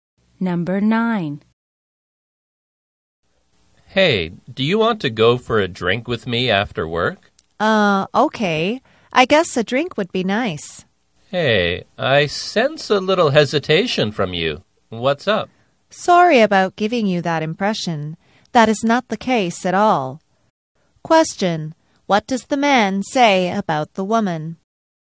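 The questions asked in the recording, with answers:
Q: What does the man say about the woman?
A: She seems a little hesitant.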